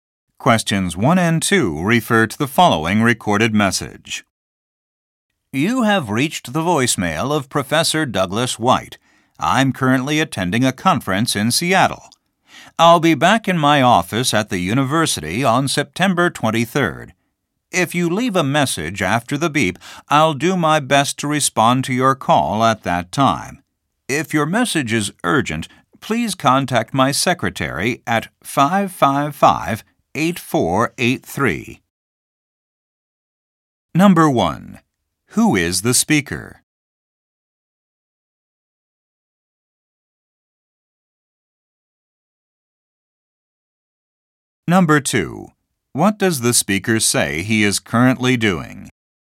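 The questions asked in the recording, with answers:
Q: Who is the speaker?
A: A university professor

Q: What does the speaker say he is currently doing?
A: Attending a conference in Seattle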